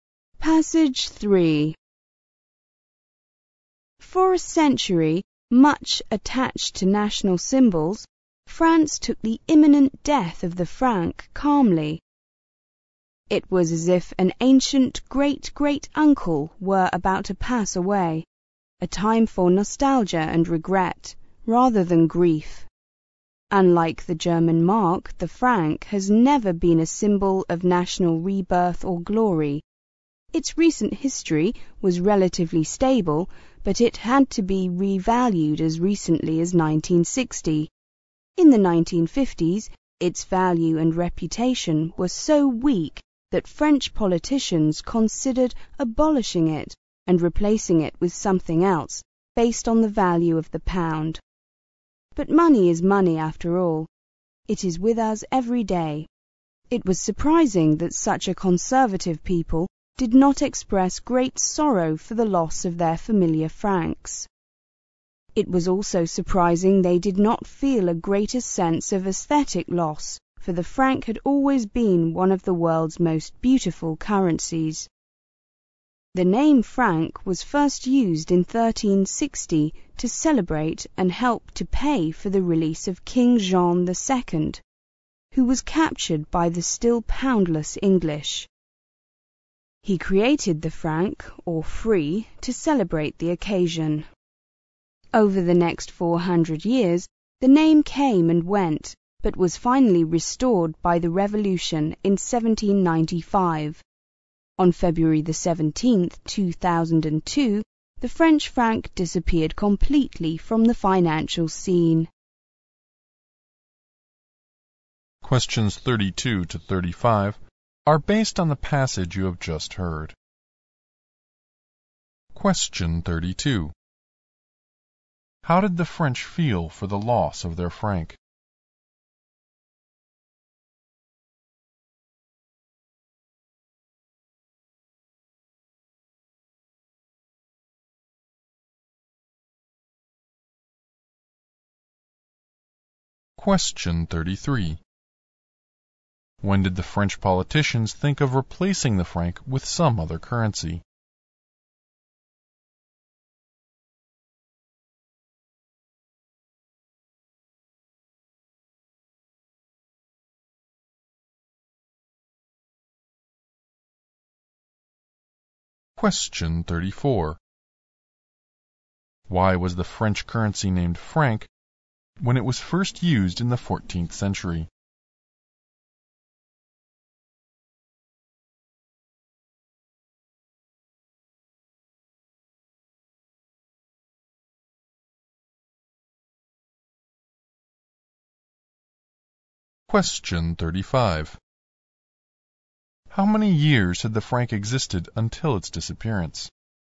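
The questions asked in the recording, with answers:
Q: How did the French feel for the loss of their franc?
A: Calm, with nostalgia and regret rather than grief

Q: When did the French politicians think of replacing the franc with some other currency?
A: In the 1950s

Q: Why was the French currency named franc when it was first used in the 14th century?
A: To celebrate the release of King Jean II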